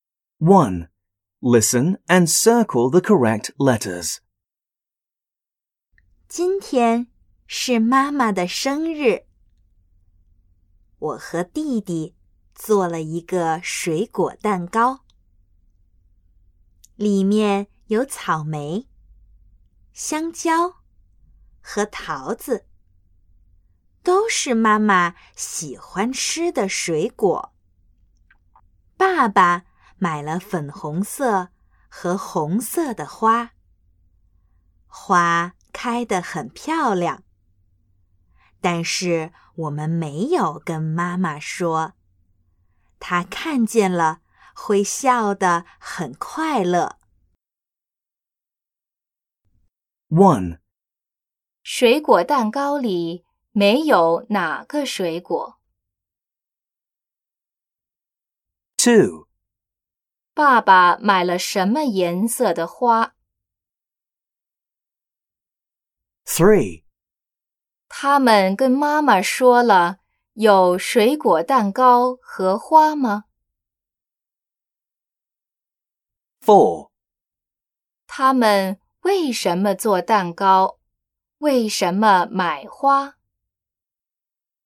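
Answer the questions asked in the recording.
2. 粉红色和红色
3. 没有
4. 因为今天是妈妈的生日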